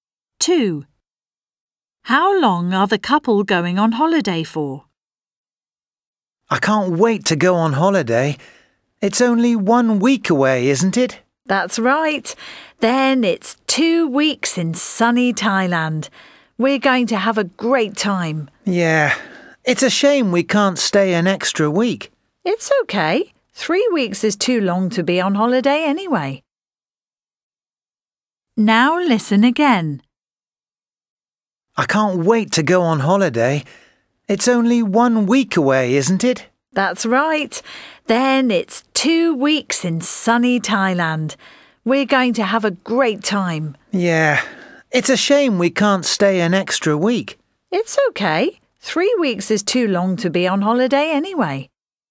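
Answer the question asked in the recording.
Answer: 2 weeks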